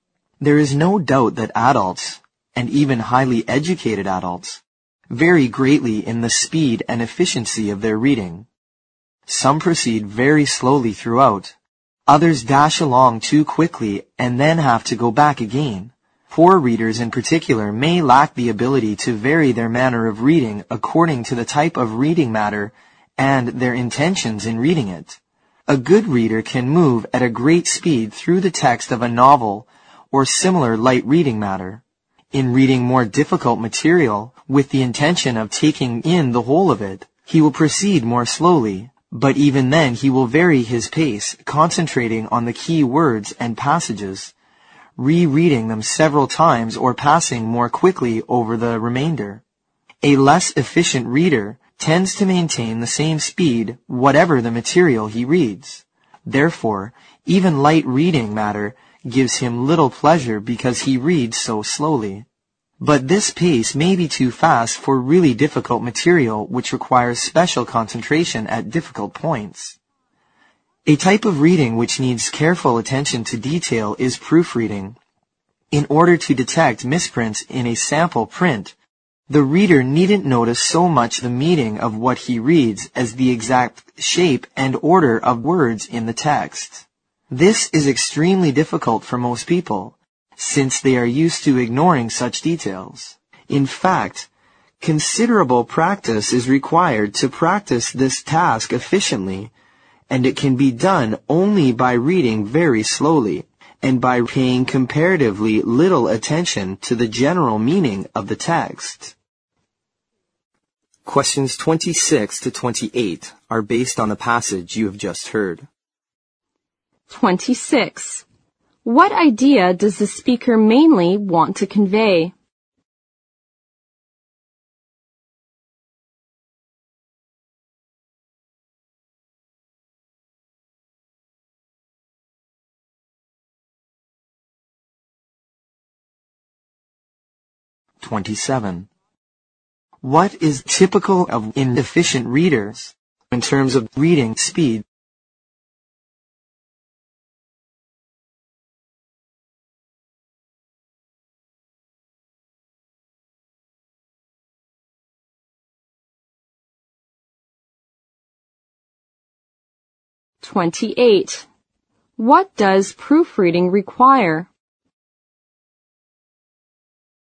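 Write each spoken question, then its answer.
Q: What is typical of inefficient readers in terms of reading speed?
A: They keep the same speed whatever the material

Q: What does proofreading require?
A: Reading very slowly, paying close attention to the exact shape and order of words rather than the meaning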